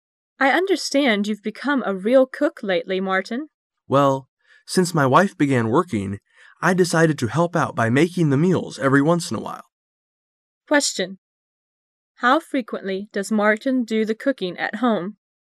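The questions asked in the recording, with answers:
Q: How frequently does Martin do the cooking at home?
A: Every once in a while

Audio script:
[解析] W: I understand you've become a real cook lately, Martin. M: Well, since my wife began working, t decided to help out by making the meals every once in a while. Q: How frequently does Martin do the cooking at home?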